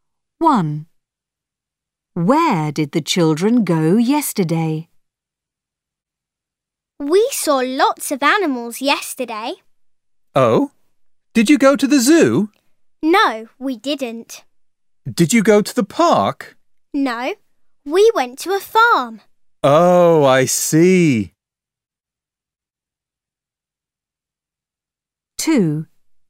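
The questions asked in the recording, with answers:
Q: Where did the children go yesterday?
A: to a farm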